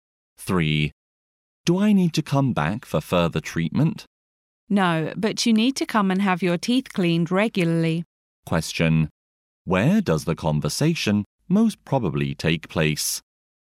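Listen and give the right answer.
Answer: At a dentist's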